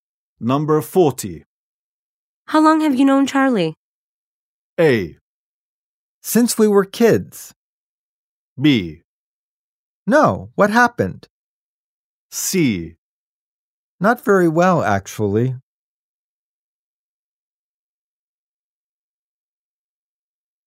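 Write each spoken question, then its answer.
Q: How long have you known Charlie?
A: A: Since we were kids.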